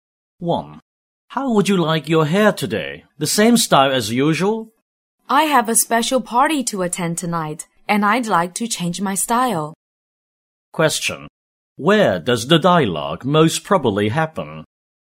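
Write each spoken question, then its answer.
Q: Where does the dialogue most probably happen?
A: At a hair salon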